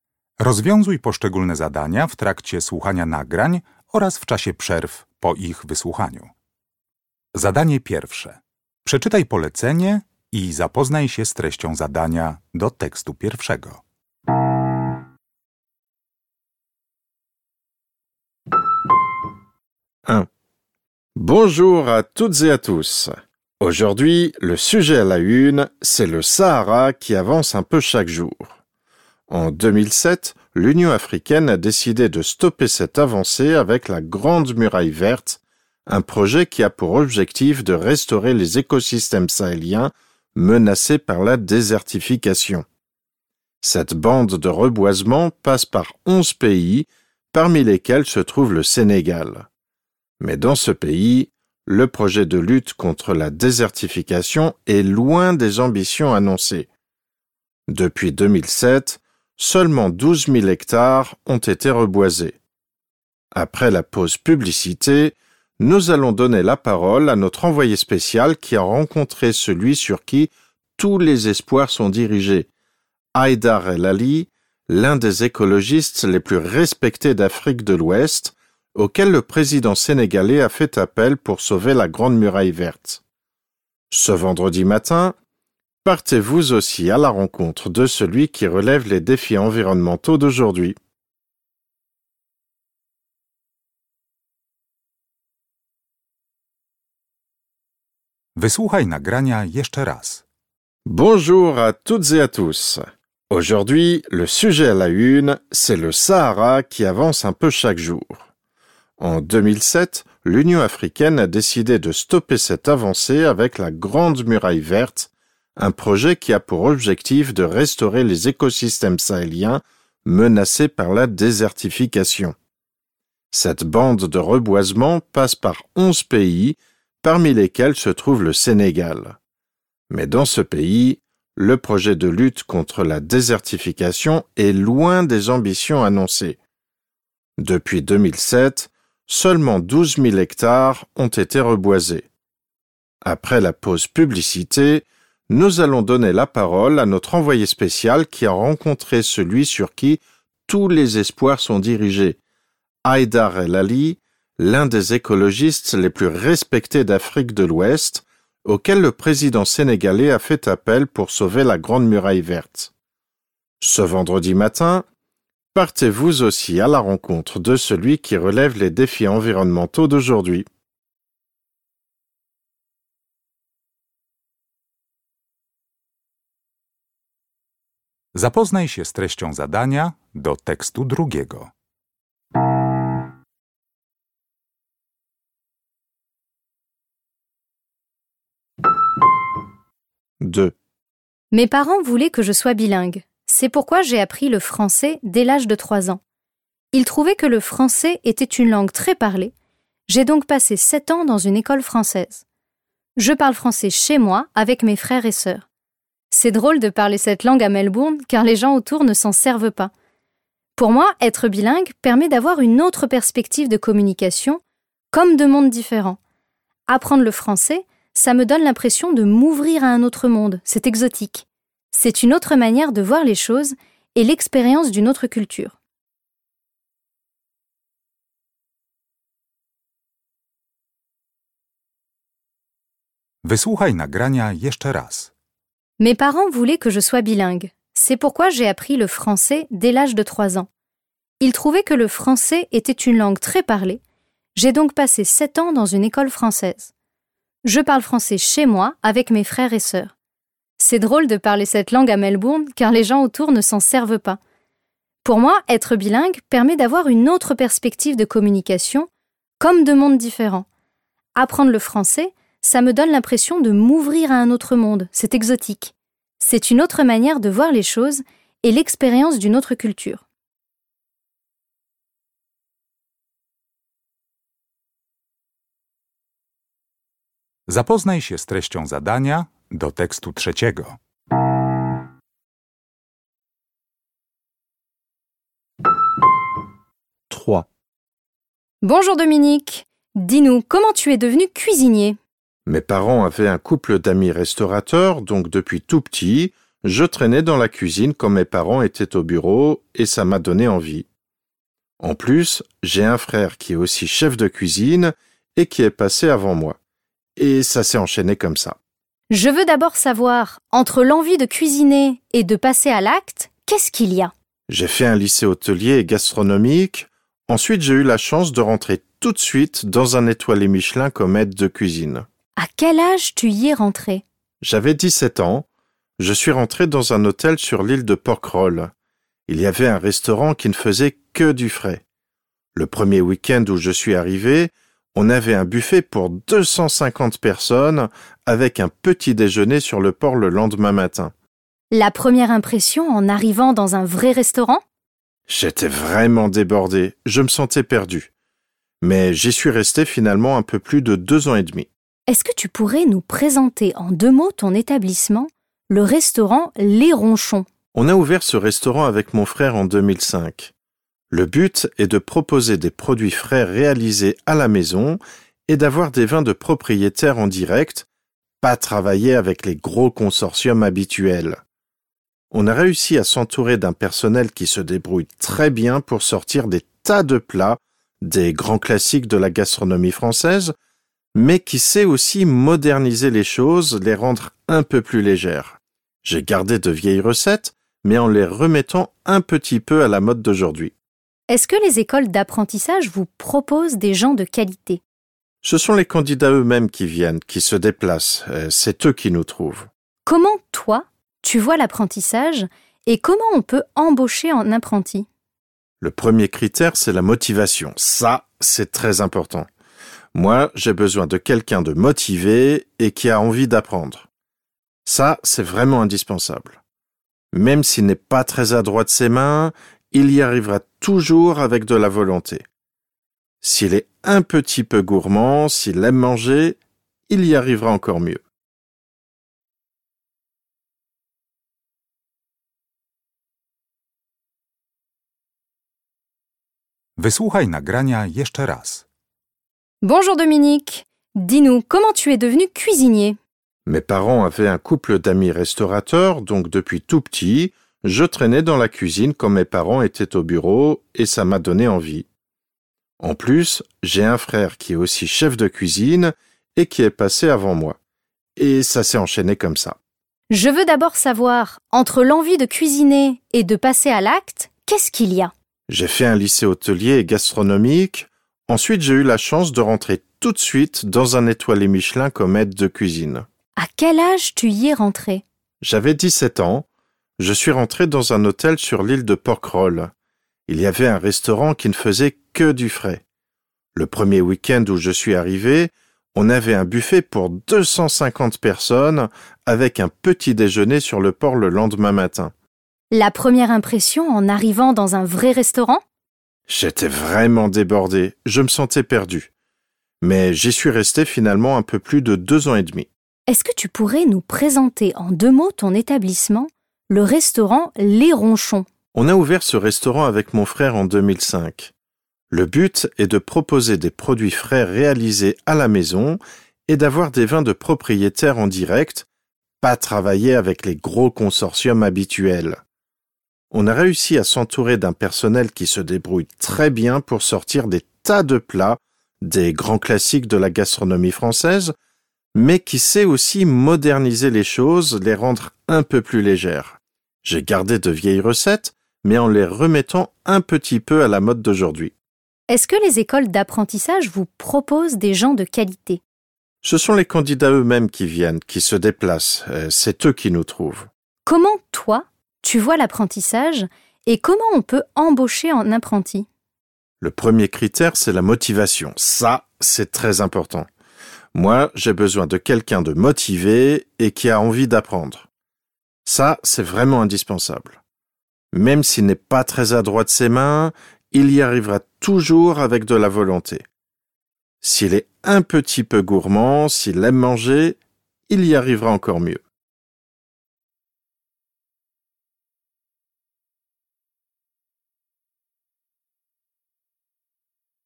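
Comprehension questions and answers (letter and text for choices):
Uruchamiając odtwarzacz z oryginalnym nagraniem CKE usłyszysz dwukrotnie trzy teksty. Z podanych odpowiedzi wybierz właściwą, zgodną z treścią nagrania.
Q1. Selon le journaliste,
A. il est impossible d'arrêter le Sahara.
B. au Sénégal, on espère toujours vaincre la nature.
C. le Sénégal est le leader du reboisement du désert.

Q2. Laquelle de ces phrases n'est pas une opinion mais un fait présenté dans le texte ?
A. Le français n'est pas parlé à Melbourne.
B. Être bilingue donne une autre vision du monde.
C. Beaucoup de gens parlent français dans le monde.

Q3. Laquelle des phrases ci-dessous est fausse ?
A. Dominique partage la passion de son frère.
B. Enfant, Dominique passait du temps dans un restaurant.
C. Dominique a suivi ses parents dans le choix de sa profession.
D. Dominique a une formation professionnelle dans son domaine.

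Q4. Dans son premier lieu de travail, Dominique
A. était très sûr de lui.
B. se sentait dépassé par le travail.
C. collaborait avec 250 personnes.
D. ne servait que les petits-déjeuners.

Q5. En parlant de son propre restaurant, Dominique dit que/qu'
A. il suit à la lettre de vieilles recettes.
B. il collabore avec de gros consortiums.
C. ses employés répondent à ses attentes.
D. les écoles gastronomiques lui proposent des apprentis.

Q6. L'intention de Dominique est de/d'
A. expliquer son parcours professionnel.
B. décrire les goûts culinaires des Français.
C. se plaindre des obstacles dans son travail.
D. évaluer l'enseignement de la gastronomie en France.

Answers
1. B. au Sénégal, on espère toujours vaincre la nature.
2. A. Le français n'est pas parlé à Melbourne.
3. C. Dominique a suivi ses parents dans le choix de sa profession.
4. B. se sentait dépassé par le travail.
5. C. ses employés répondent à ses attentes.
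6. A. expliquer son parcours professionnel.

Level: Poziom: rozszerzony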